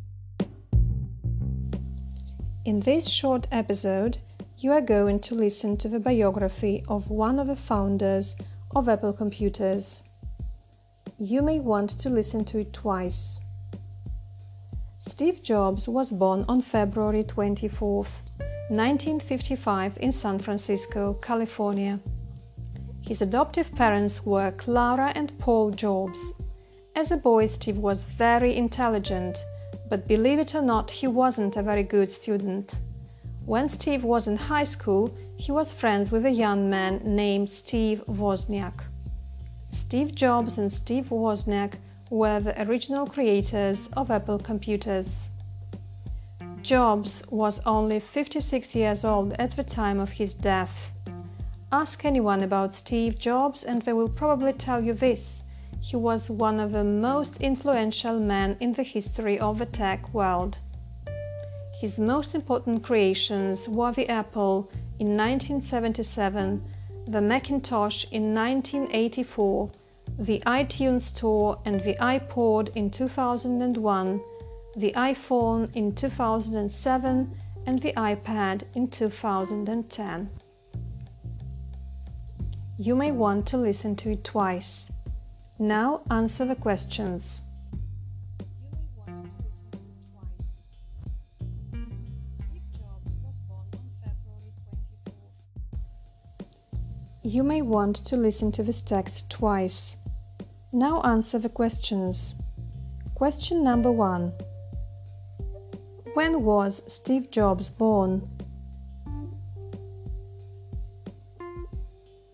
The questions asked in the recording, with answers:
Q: When was Steve Jobs born?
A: Steve Jobs was born on February 24th in 1955.